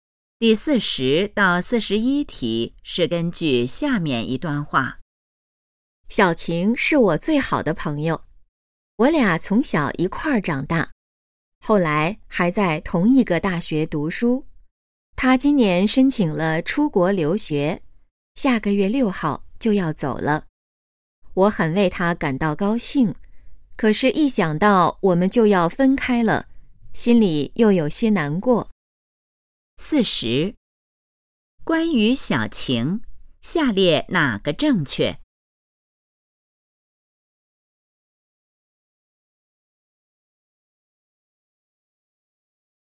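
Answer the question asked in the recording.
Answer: 他们就要分开了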